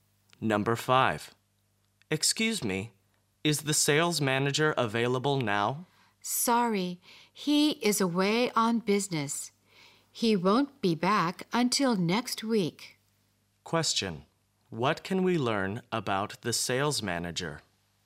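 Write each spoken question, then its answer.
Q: What can we learn about the sales manager?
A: He is away on business until next week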